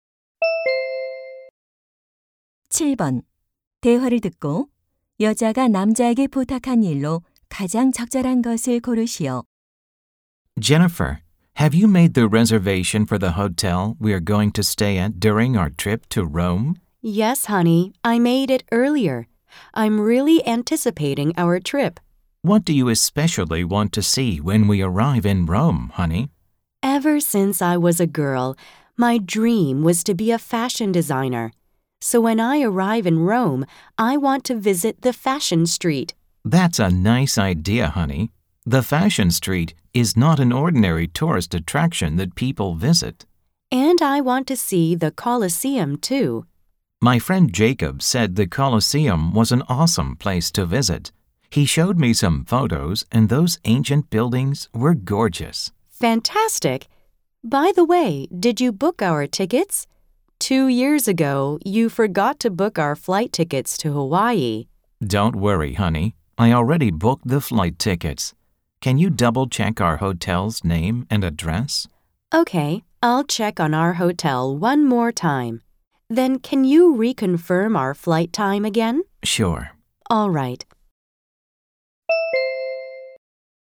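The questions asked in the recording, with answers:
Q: 대화를 듣고 여자가 남자에게 부탁한 일로 가장 적절한 것을 고르시오.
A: 호텔 이름과 주소 재확인하기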